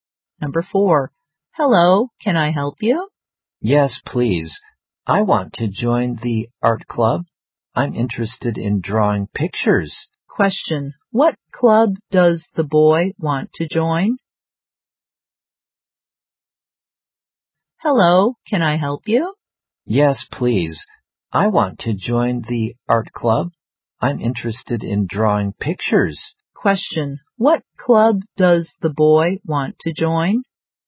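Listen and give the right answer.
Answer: The art club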